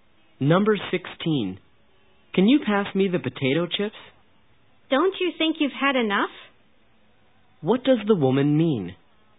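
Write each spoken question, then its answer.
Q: What does the woman mean?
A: The man has eaten enough potato chips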